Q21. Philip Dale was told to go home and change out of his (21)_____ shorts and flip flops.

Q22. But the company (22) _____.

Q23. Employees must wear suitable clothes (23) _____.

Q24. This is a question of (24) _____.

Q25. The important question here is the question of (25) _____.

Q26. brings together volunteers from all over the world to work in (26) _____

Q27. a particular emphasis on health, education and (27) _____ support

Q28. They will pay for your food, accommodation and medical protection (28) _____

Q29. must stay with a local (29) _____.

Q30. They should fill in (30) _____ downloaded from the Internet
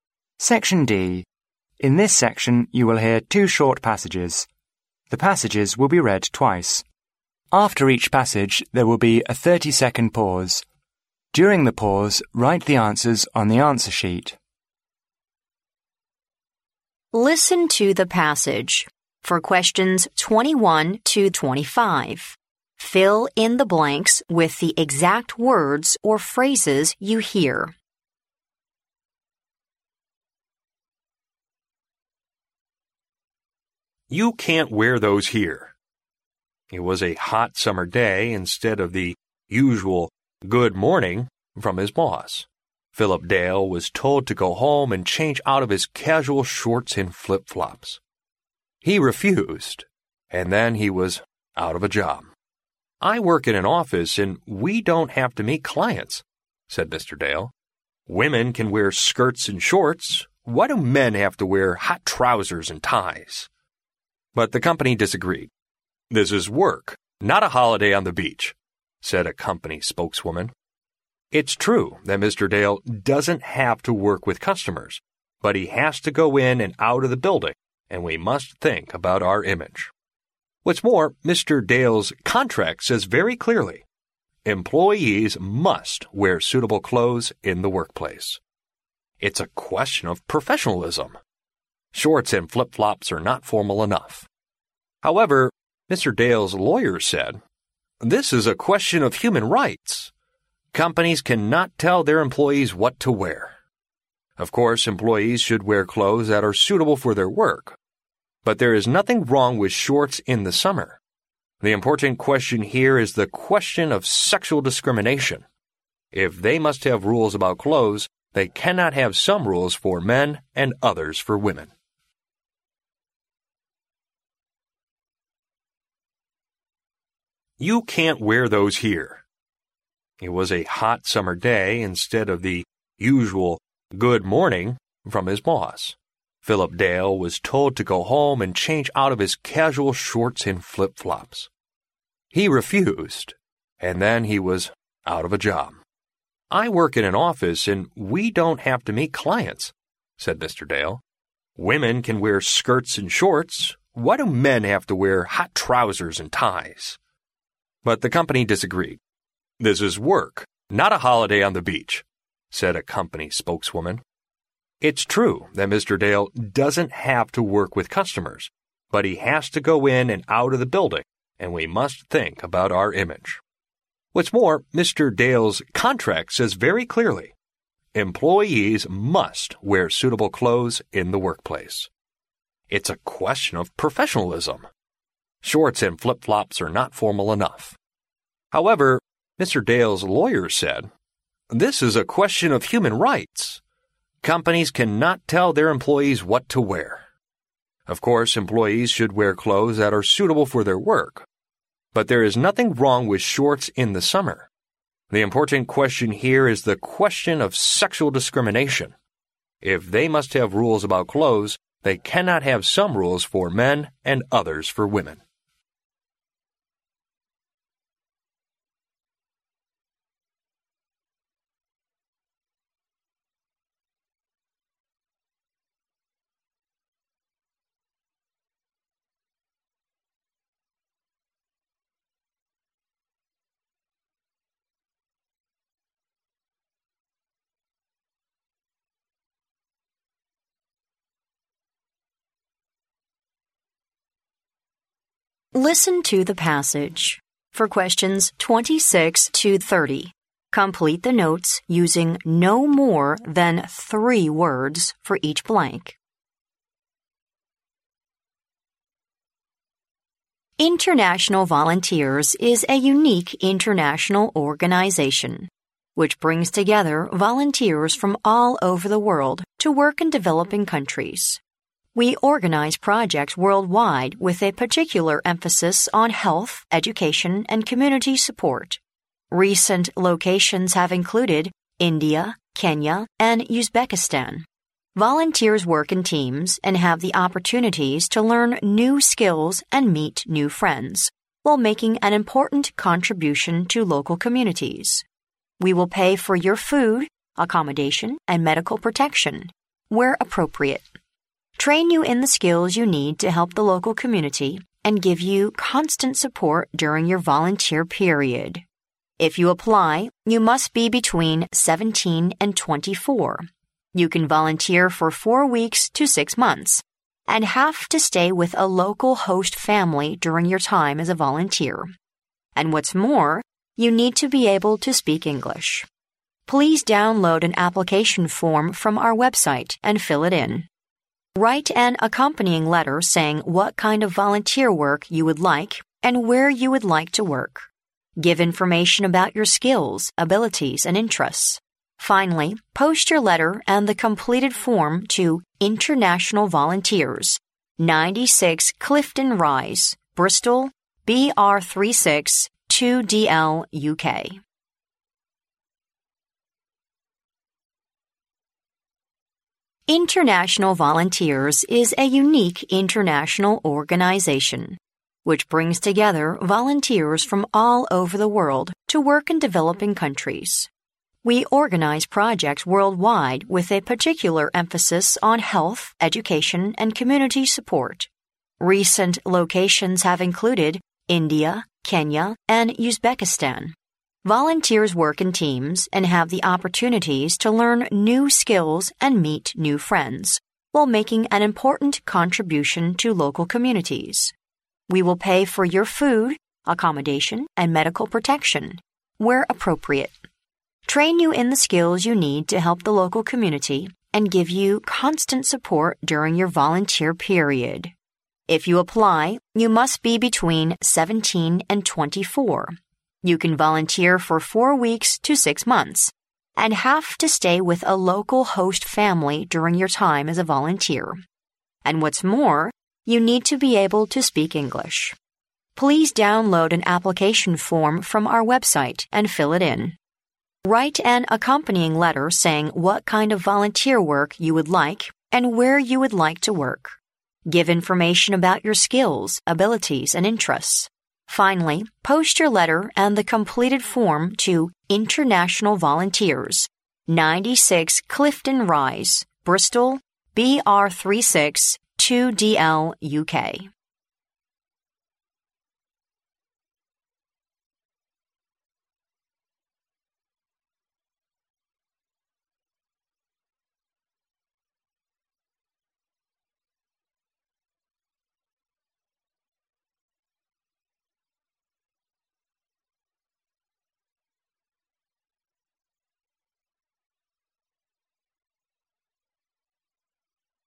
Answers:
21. casual
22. disagreed
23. in the workplace
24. human rights
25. sexual discrimination
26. developing countries
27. community
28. where appropriate
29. host family
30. an application form

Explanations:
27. 录音中提及国际志愿者组织活动的重点在于"health, education and community support",故答案为community。
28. 录音中提到国际志愿者组织将会提供"food, accommodation and medical protection where appropriate",故答案为where appropriate。
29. 录音中提到志愿者在活动中必须"stay with a local host family",故答案为host family。
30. 录音中提到申请成为志愿者的方法是"download an application form from our website and fill it in",故答案为an application form。

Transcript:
In this section, you will hear two short passages. The passages will be read twice. After each passage, there will be a thirty-second pause. During the pause, write the answers on the answer sheet.
Listen to the passage. For questions 21—25, fill in the blanks with the exact words or phrases you hear.
"You can't wear those here!" It was a hot summer day, instead of the usual "Good morning" from his boss, Philip Dale was told to go home and change out of his casual shorts and flip flops. He refused and then he was out of a job. "I work in an office and we don't have to meet clients," said Mr. Dale. "Women can wear skirts and shorts. Why do men have to wear hot trousers and ties?"
But the company disagreed "This is work, not a holiday on the beach," said a company spokeswoman. "It's true that Mr. Dale doesn't have to work with customers, but he has to go in and out of the building and we must think about our image. What's more, Mr. Dale's contract says very clearly, 'Employees must wear suitable clothes in the workplace.' It's a question of professionalism. Shorts and flip flops are not formal enough." However, Mr. Dale's lawyer said: "This is a question of human rights. Companies cannot tell their employees what to wear. Of course, employees should wear clothes that are suitable for their work, but there is nothing wrong with shorts in the summer. The important question here is the question of sexual discrimination. If they must have rules about clothes, they cannot have some rules for men and others for women."
For questions 26—30, complete the notes using no more than three words for each blank.
26 developing countries
28 where appropriate
29 host family
International Volunteers is a unique international organisation which brings together volunteers from all over the world to work in developing countries. We organise projects worldwide with a particular emphasis on health, education and community support—recent locations have included India, Kenya and Uzbekistan. Volunteers work in teams and have the opportunities to learn new skills and meet new friends while making an important contribution to local communities.
We will pay for your food, accommodation and medical protection where appropriate, train you in the skills you need to help the local community, and give you constant support during your volunteer period.
If you apply, you must be between 17 and 24. You can volunteer for four weeks to six months and have to stay with a local host family during your time as a volunteer. And what's more, you need to be able to speak English.
Please download an application form from our website and fill it in. Write an accompanying letter saying what kind of volunteer work you would like and where you would like to work. Give information about your skills, abilities and interests. Finally, post your letter and the completed form to INTERNATIONAL VOLUNTEERS, 96 Clifton Rise, Bristol BR36 2DL, UK.